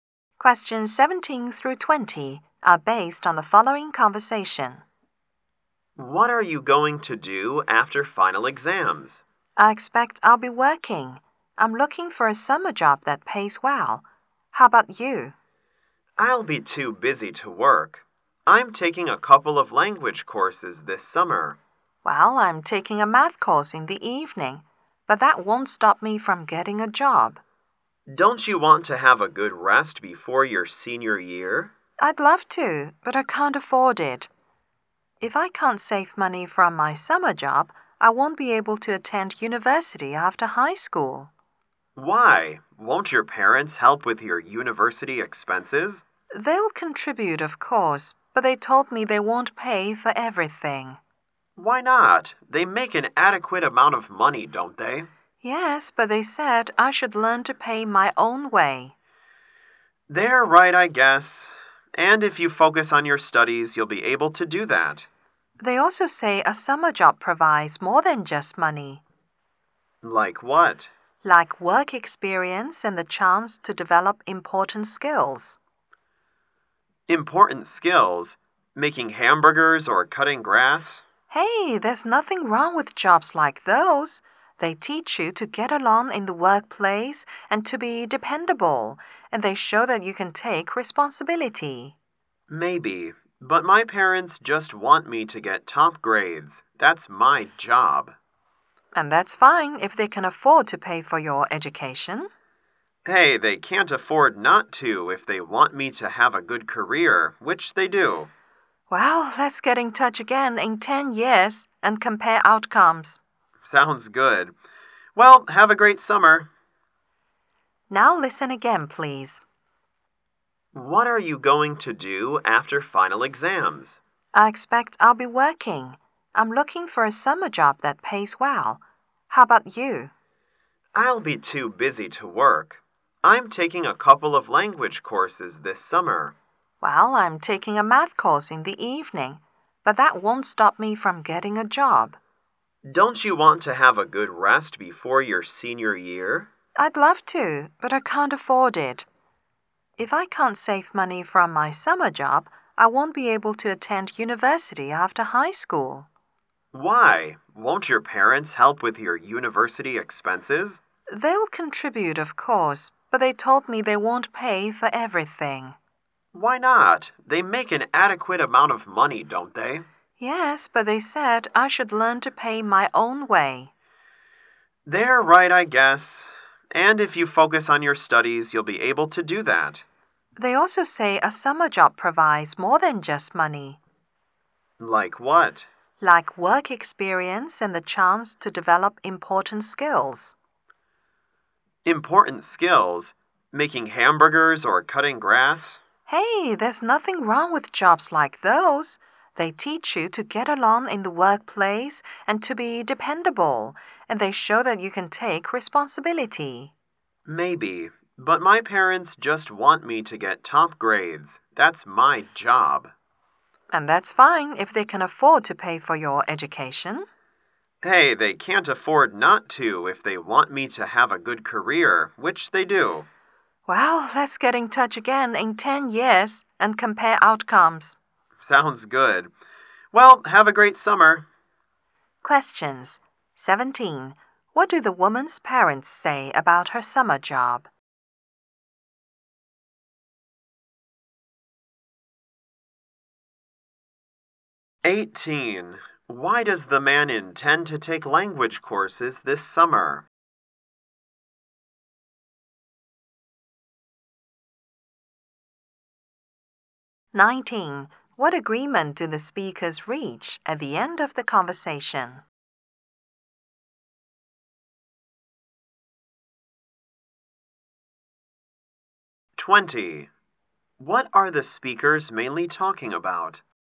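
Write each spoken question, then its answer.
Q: What do the woman's parents say about her summer job?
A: It gives more than money: work experience and the chance to develop important skills.

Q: What agreement do the speakers reach at the end of the conversation?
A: To get in touch again in 10 years and compare how things turned out.

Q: What are the speakers mainly talking about?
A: Their plans for the summer, and whether to get a summer job.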